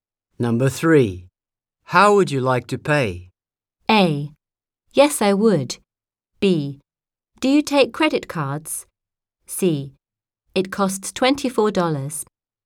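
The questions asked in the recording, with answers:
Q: How would you like to pay?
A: B: Do you take credit cards?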